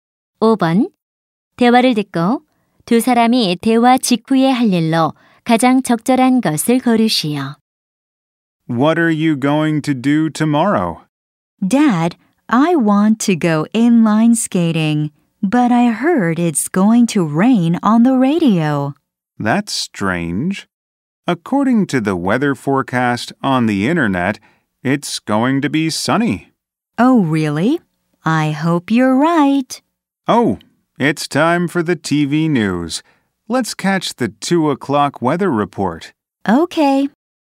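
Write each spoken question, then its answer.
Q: 대화를 듣고 두 사람이 대화 직후에 할 일로 가장 적절한 것을 고르시오.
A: TV 일기 예보 보기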